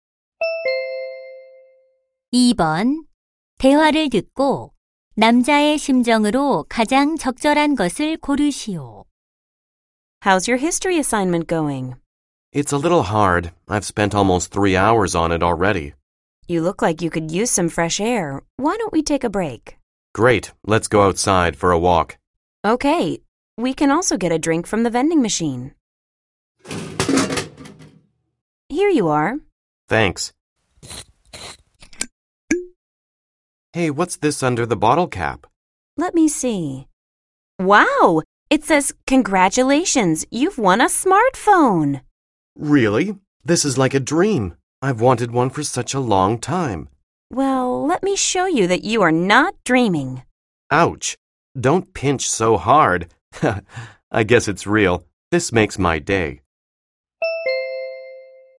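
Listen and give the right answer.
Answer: 기쁘고 신남 (excited)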